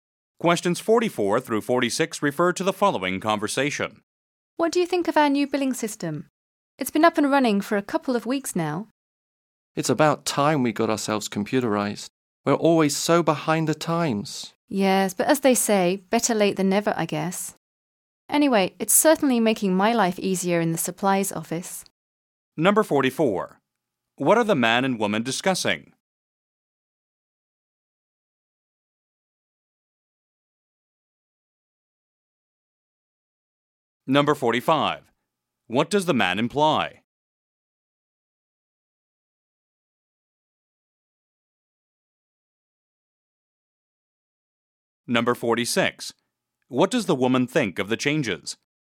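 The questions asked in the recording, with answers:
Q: What are the man and woman discussing?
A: The new computerized billing system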